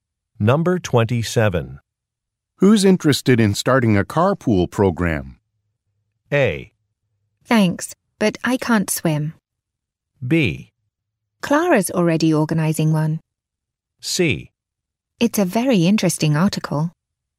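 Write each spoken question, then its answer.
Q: Who's interested in starting a carpool program?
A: B: Clara's already organizing one.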